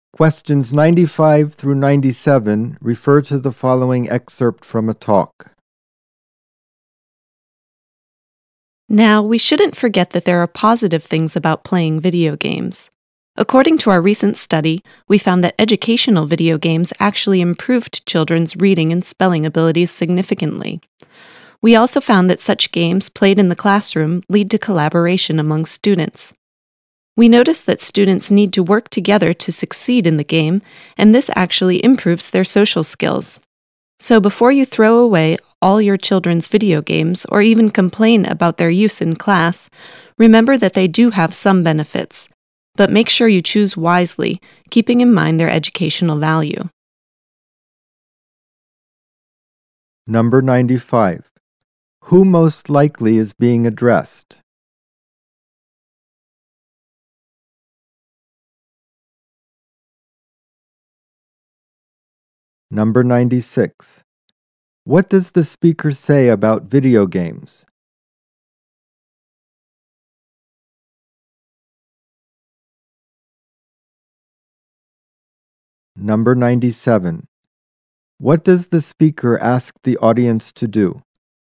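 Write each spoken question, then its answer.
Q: What does the speaker say about video games?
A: They can improve children's reading, spelling and social skills

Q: What does the speaker ask the audience to do?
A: Choose games wisely, considering their educational value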